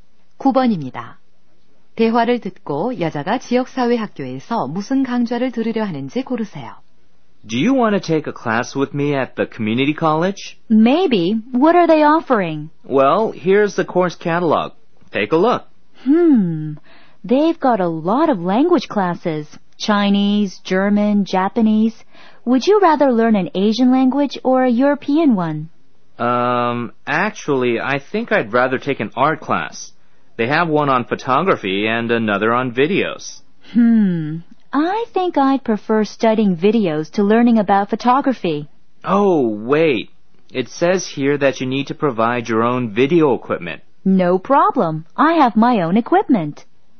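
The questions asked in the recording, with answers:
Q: 대화를 듣고 여자가 지역사회학교에서 무슨 강좌를 들으려 하는지 고르세요.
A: 비디오 강좌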